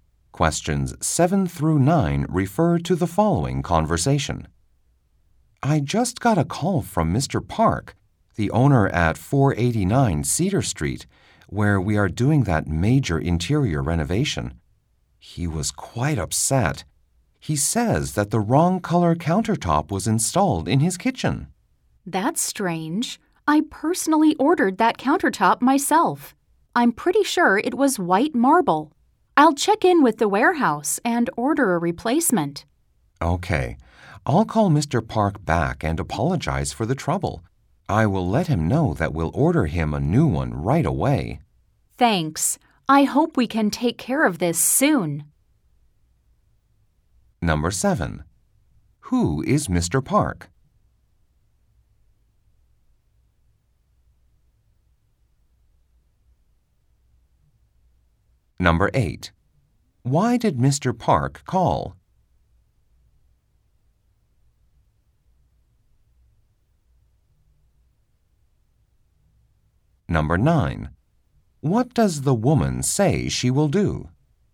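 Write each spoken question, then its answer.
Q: Who is Mr. Park?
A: The owner of the property at 489 Cedar Street, a client whose home is being renovated

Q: Why did Mr. Park call?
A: The wrong color countertop was installed in his kitchen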